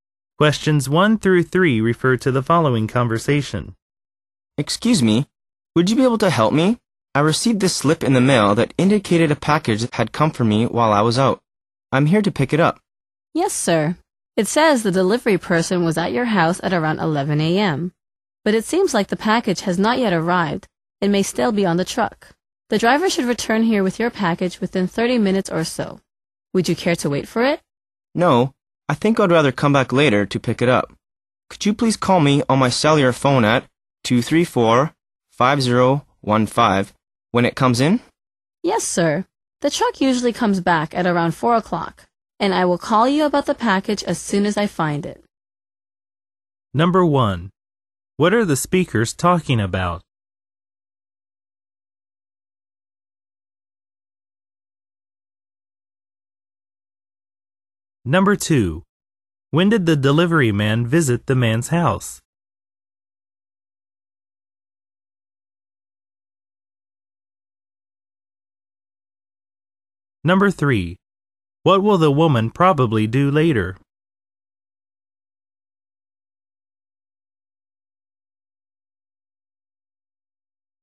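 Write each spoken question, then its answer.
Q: What are the speakers talking about?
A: Picking up a package that was delivered while the man was out

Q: When did the delivery man visit the man's house?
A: Around 11 a.m.

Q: What will the woman probably do later?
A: Call the man when the package comes in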